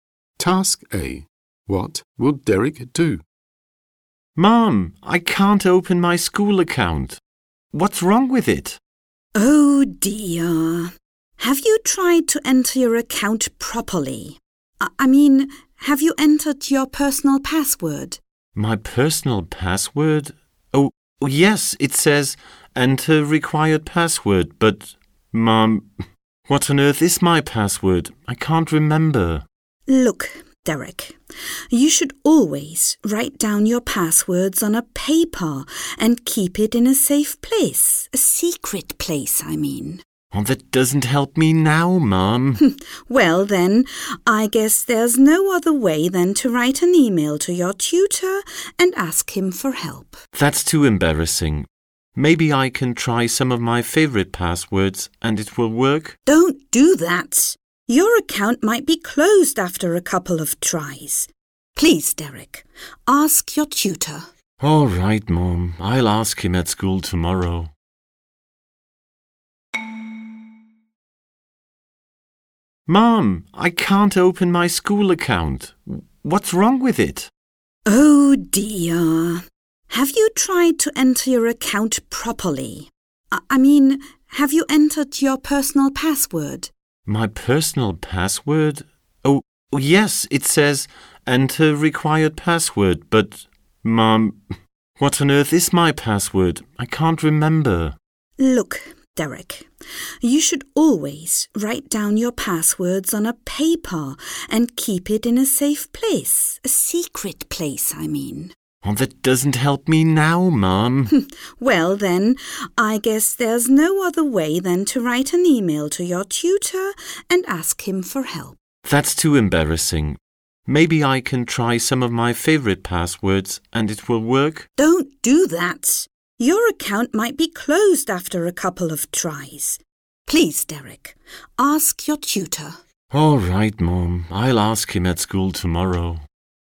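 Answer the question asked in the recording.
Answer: Ask his tutor at school tomorrow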